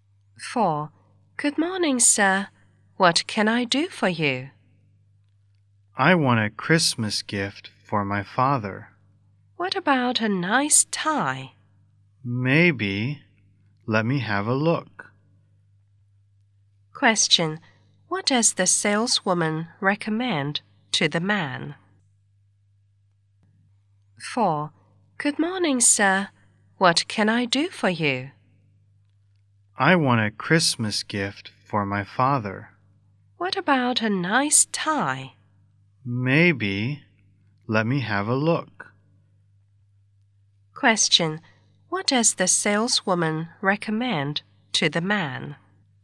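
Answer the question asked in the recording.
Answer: A nice tie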